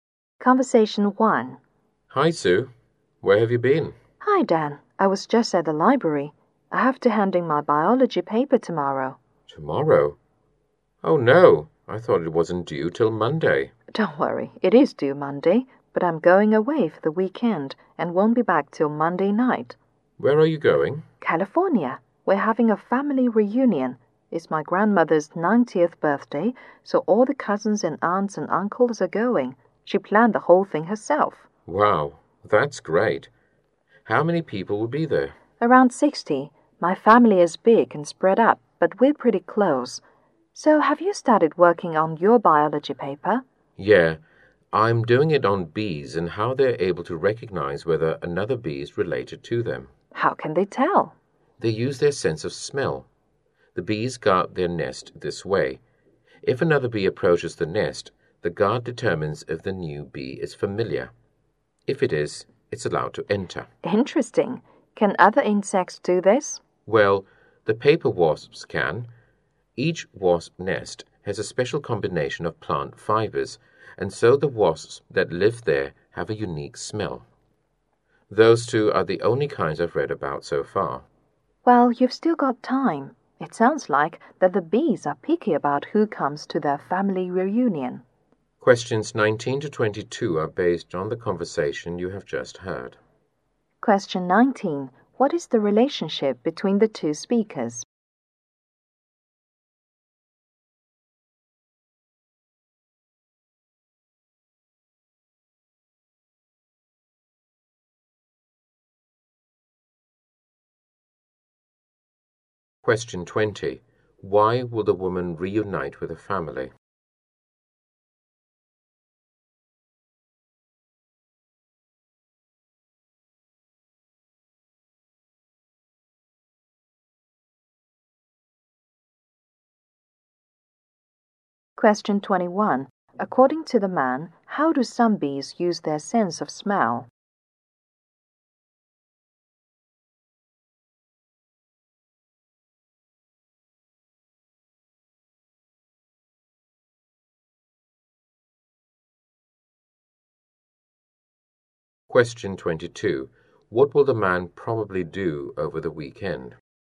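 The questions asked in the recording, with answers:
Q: Why will the woman reunite with her family?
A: To celebrate her grandmother's 90th birthday.

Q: According to the man, how do some bees use their sense of smell?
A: To recognize whether another bee is related/familiar and guard their nest.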